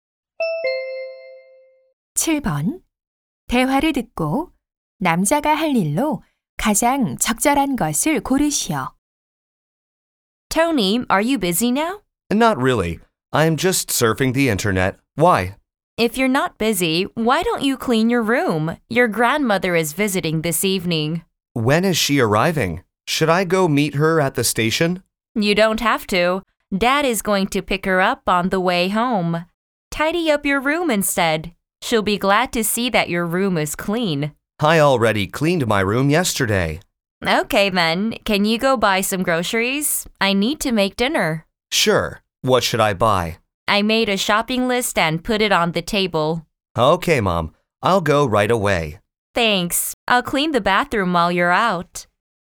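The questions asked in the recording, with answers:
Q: 대화를 듣고 남자가 할 일로 가장 적절한 것을 고르시오.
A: 식료품 사러 가기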